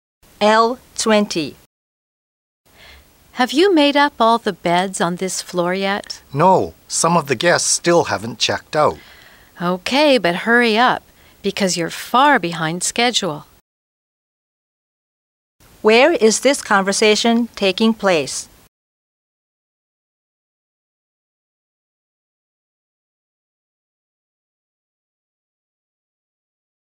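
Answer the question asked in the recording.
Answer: In a hotel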